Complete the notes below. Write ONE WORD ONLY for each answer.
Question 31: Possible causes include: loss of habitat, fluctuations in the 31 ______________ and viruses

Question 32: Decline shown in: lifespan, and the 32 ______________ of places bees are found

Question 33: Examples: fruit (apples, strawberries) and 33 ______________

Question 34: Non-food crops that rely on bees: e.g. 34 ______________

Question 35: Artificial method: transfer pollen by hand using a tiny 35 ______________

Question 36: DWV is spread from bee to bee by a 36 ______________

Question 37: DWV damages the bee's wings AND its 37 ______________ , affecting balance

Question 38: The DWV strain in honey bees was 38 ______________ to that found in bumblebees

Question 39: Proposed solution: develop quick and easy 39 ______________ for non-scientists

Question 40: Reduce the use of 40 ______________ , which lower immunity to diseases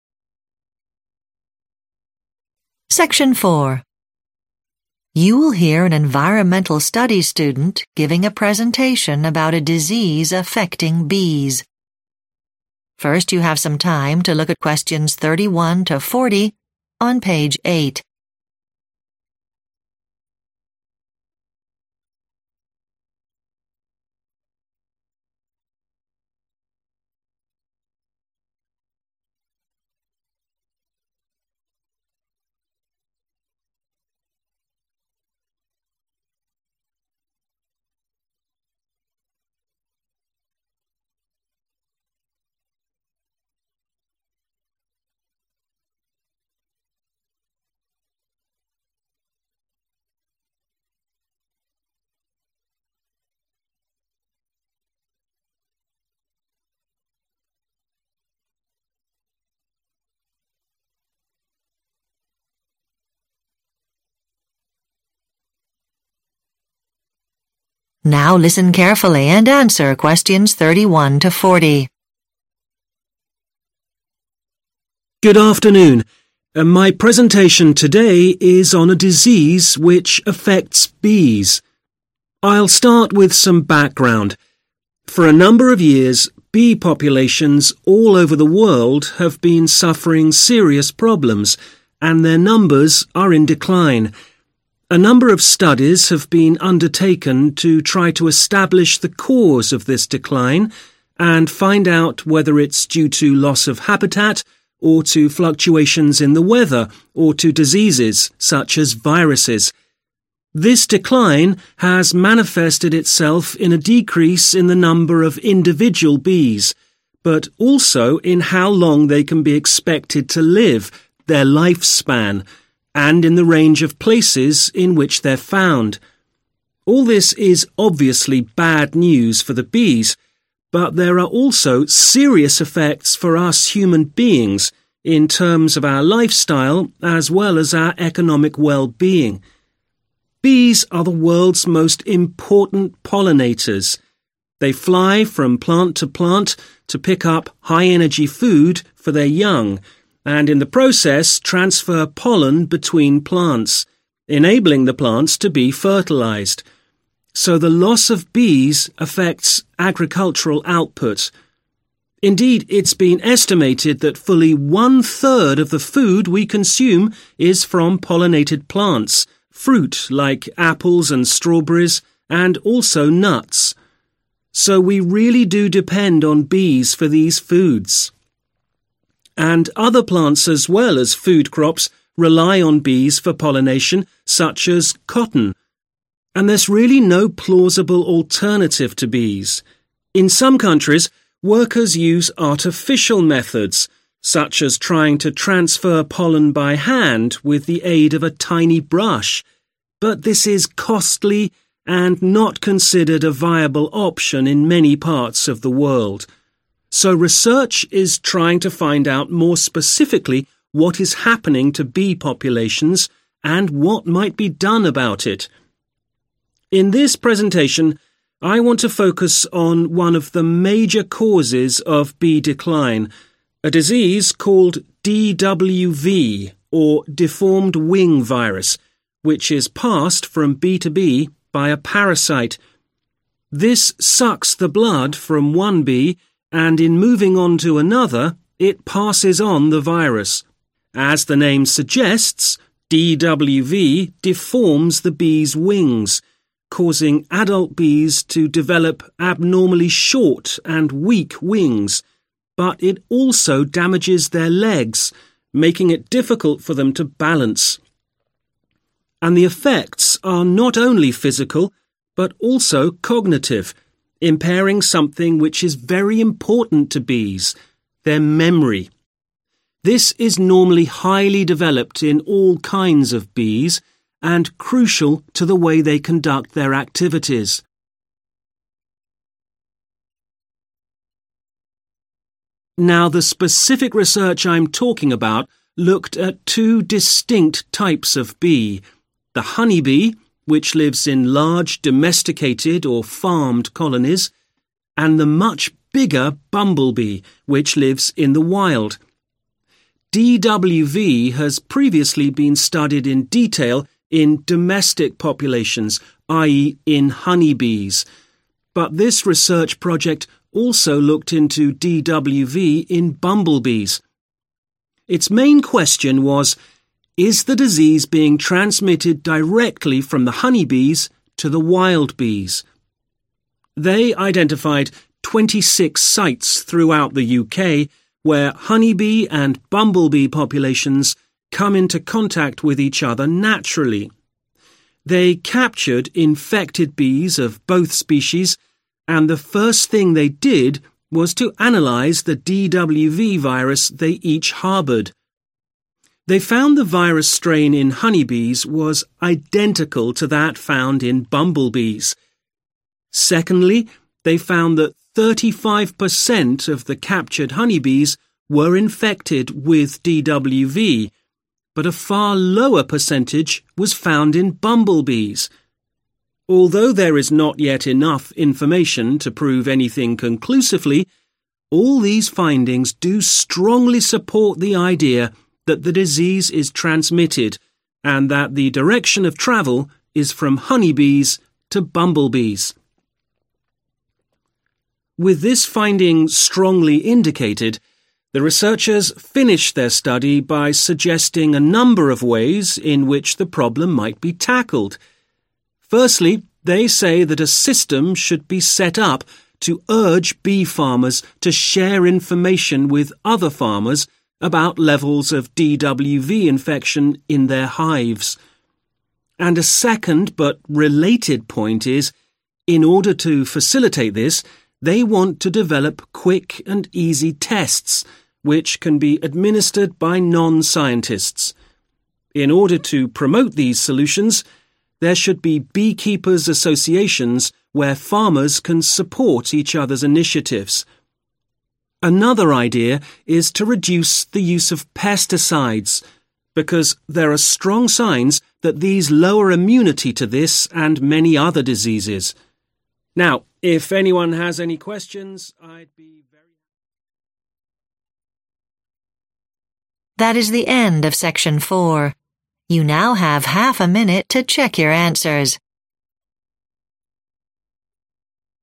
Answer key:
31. weather
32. range
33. nuts
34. cotton
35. brush
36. parasite
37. legs
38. identical
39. tests
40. pesticides